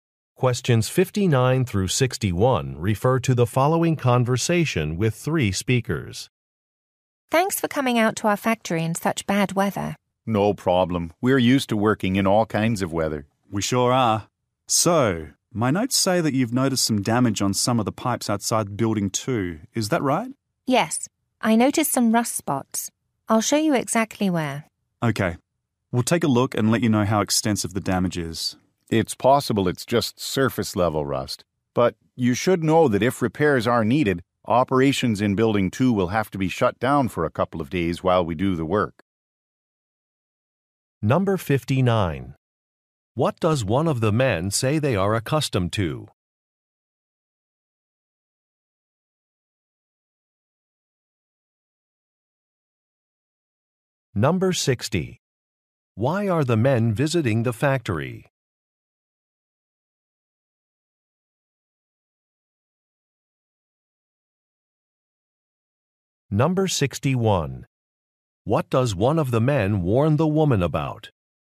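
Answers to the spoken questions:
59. Working in all kinds of weather
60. To inspect damaged (rusty) pipes
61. Building 2 may have to shut down for a couple of days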